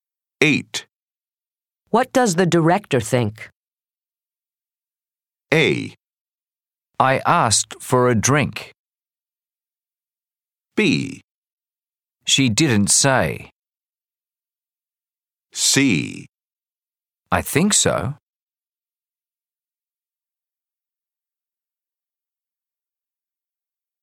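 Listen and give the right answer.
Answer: B: She didn't say.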